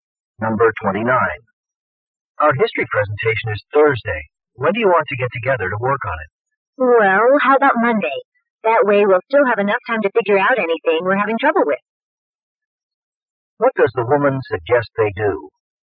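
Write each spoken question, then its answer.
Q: What does the woman suggest they do?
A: Meet on Monday to work on the presentation.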